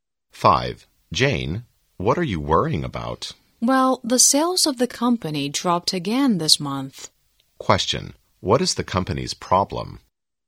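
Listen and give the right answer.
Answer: Its sales dropped again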